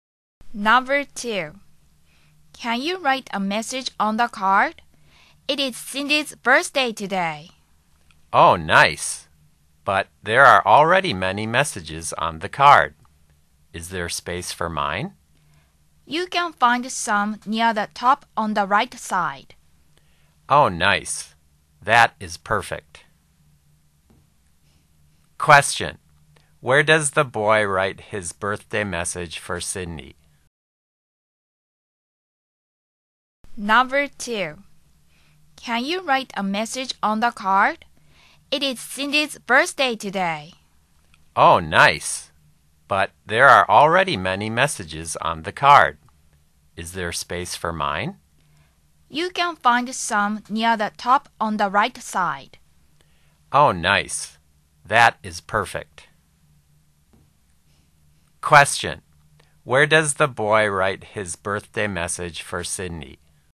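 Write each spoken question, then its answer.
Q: Where does the boy write his birthday message for Cindy?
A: Near the top on the right side of the card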